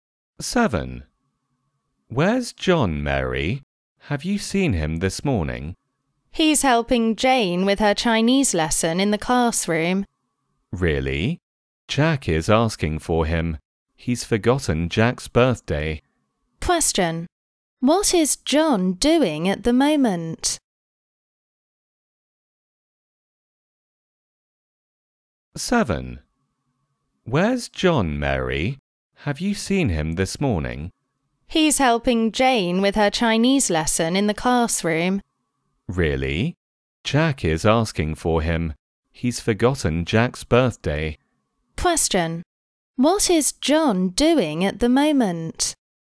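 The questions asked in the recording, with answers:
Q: What is John doing at the moment?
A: Helping Jane with her Chinese lesson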